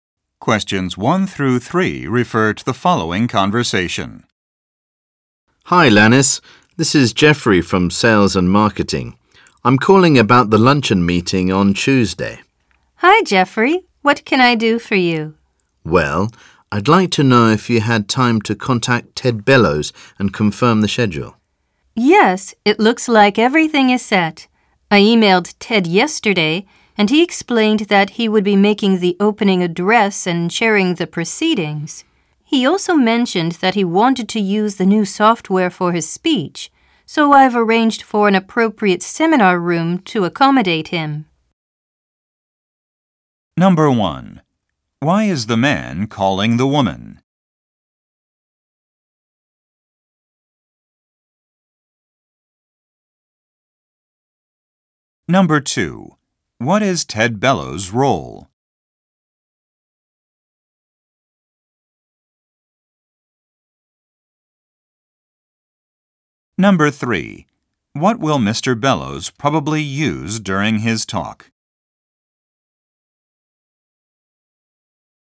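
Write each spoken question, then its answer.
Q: Why is the man calling the woman?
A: To ask if she confirmed the schedule with Ted Bellows for Tuesday's luncheon meeting

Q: What is Ted Bellows' role?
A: Giving the opening address and chairing the proceedings

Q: What will Mr. Bellows probably use during his talk?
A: New software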